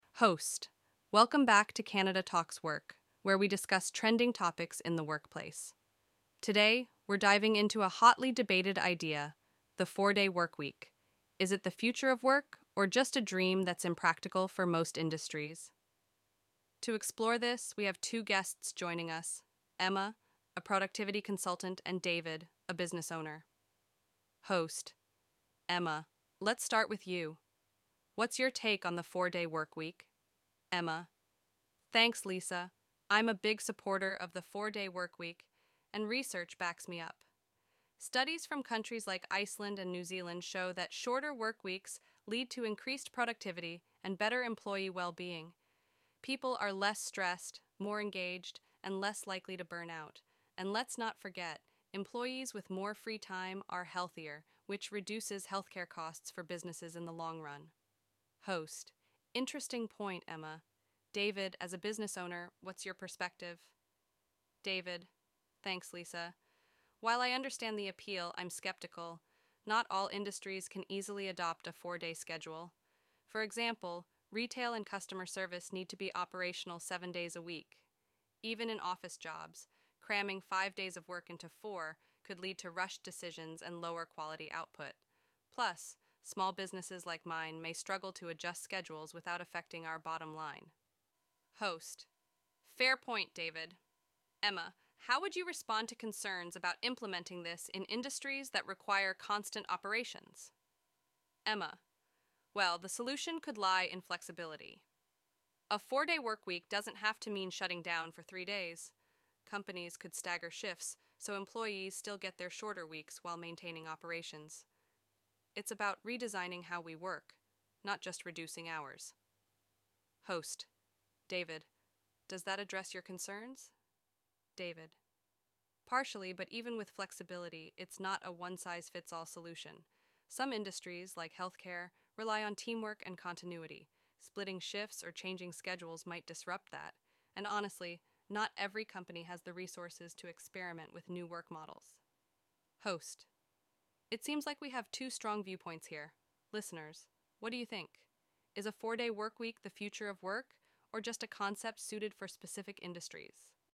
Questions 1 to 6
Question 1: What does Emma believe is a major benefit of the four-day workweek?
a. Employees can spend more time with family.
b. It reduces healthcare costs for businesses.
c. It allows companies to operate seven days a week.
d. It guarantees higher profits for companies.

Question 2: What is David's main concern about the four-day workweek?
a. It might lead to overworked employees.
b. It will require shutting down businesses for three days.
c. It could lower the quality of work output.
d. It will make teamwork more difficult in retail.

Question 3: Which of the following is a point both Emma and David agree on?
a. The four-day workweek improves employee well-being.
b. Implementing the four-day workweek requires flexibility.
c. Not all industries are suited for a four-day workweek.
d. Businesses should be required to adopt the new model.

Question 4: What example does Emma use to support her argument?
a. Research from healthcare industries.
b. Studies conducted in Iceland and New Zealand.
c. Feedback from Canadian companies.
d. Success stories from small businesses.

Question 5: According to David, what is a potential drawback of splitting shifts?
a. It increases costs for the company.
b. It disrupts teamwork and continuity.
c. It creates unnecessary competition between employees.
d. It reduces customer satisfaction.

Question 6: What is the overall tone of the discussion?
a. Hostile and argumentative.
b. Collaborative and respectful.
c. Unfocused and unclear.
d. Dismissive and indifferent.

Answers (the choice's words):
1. It reduces healthcare costs for businesses.
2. It could lower the quality of work output.
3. Not all industries are suited for a four-day workweek.
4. Studies conducted in Iceland and New Zealand.
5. It disrupts teamwork and continuity.
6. Collaborative and respectful.

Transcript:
Host:
Welcome back to Canada Talks Work, where we discuss trending topics in the workplace. Today, we're diving into a hotly debated idea: the four-day workweek. Is it the future of work or just a dream that's impractical for most industries? To explore this, we have two guests joining us—Emma, a productivity consultant, and David, a business owner.
Host:
Emma, let's start with you. What's your take on the four-day workweek?
Emma:
Thanks, Lisa. I'm a big supporter of the four-day workweek, and research backs me up. Studies from countries like Iceland and New Zealand show that shorter workweeks lead to increased productivity and better employee well-being. People are less stressed, more engaged, and less likely to burn out. And let's not forget—employees with more free time are healthier, which reduces healthcare costs for businesses in the long run.
Host:
Interesting point, Emma. David, as a business owner, what's your perspective?
David:
Thanks, Lisa. While I understand the appeal, I'm skeptical. Not all industries can easily adopt a four-day schedule. For example, retail and customer service need to be operational seven days a week. Even in office jobs, cramming five days of work into four could lead to rushed decisions and lower quality output. Plus, small businesses like mine may struggle to adjust schedules without affecting our bottom line.
Host:
Fair point, David. Emma, how would you respond to concerns about implementing this in industries that require constant operations?
Emma:
Well, the solution could lie in flexibility. A four-day workweek doesn't have to mean shutting down for three days. Companies could stagger shifts so employees still get their shorter weeks while maintaining operations. It's about redesigning how we work, not just reducing hours.
Host:
David, does that address your concerns?
David:
Partially, but even with flexibility, it's not a one-size-fits-all solution. Some industries, like healthcare, rely on teamwork and continuity. Splitting shifts or changing schedules might disrupt that. And, honestly, not every company has the resources to experiment with new work models.
Host:
It seems like we have two strong viewpoints here. Listeners, what do you think?